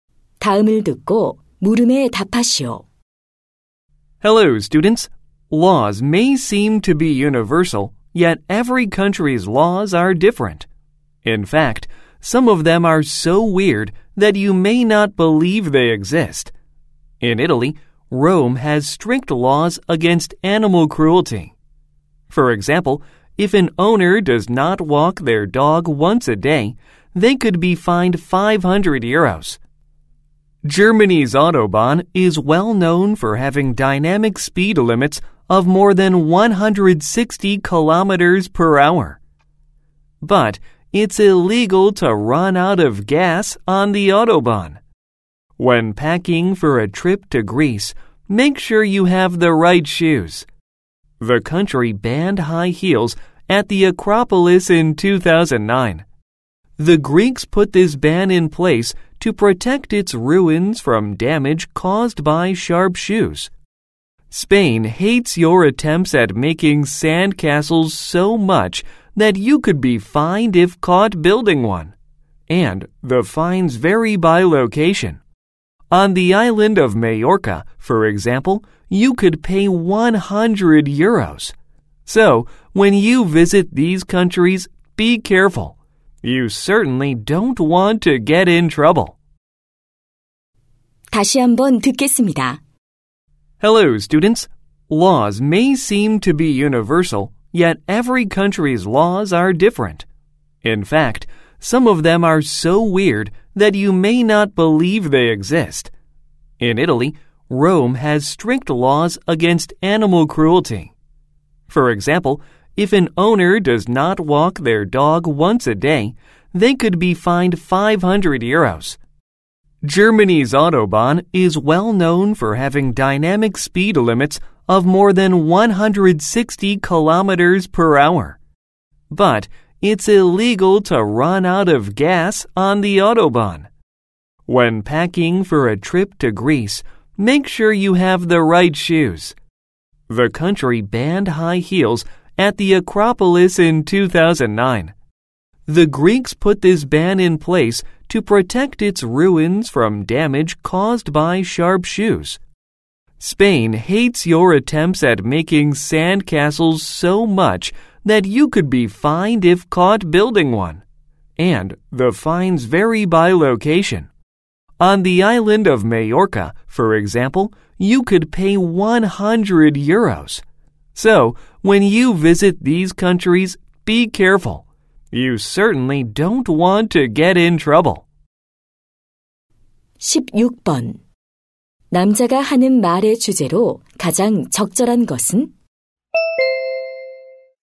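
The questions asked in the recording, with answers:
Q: 남자가 하는 말의 주제로 가장 적절한 것은?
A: 여러 나라의 이상한 법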